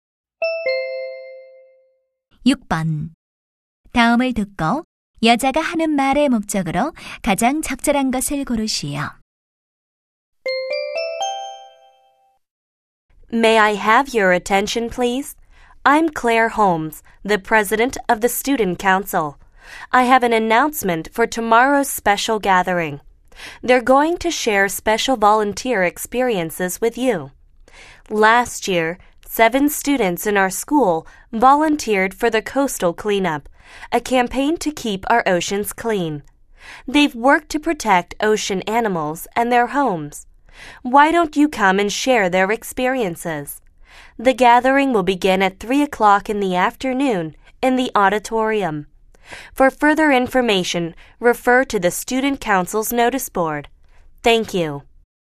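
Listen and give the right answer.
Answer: 봉사활동 경험 공유 모임 안내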